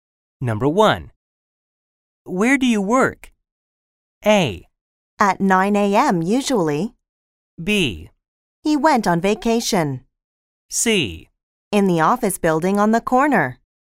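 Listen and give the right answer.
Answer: C: In the office building on the corner.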